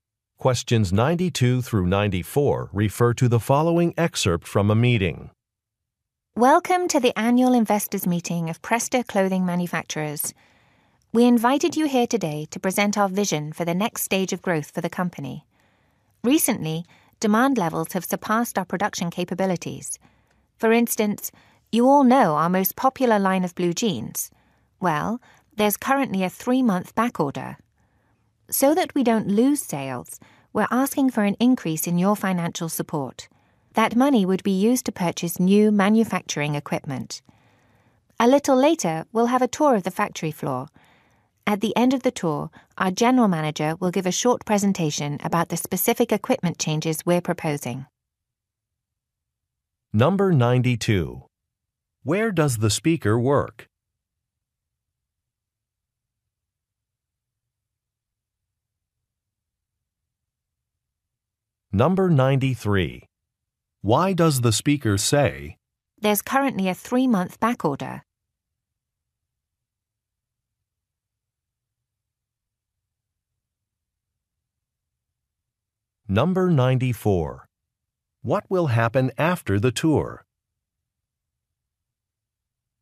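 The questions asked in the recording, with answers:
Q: Where does the speaker work?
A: At a clothing manufacturer

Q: What will happen after the tour?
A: The general manager will give a presentation about equipment changes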